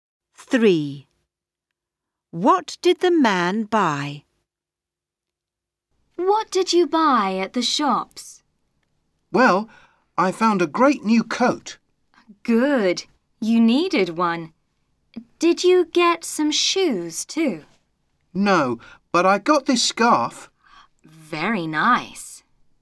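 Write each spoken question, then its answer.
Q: What did the man buy?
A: a coat and a scarf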